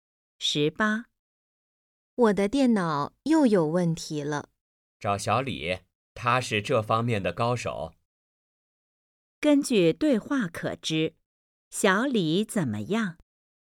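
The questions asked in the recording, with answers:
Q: 根据对话可知,小李怎么样?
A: 是电脑方面的高手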